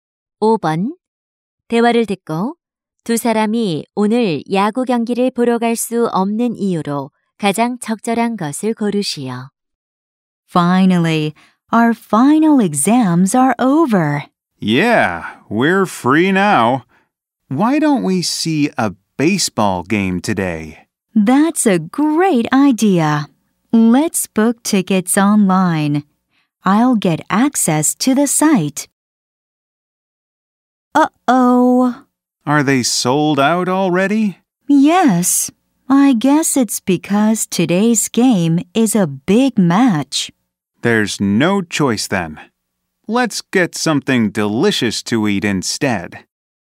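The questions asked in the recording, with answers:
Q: 대화를 듣고 두 사람이 오늘 야구 경기를 보러 갈 수 없는 이유로 가장 적절한 것을 고르시오.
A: 표가 매진되어서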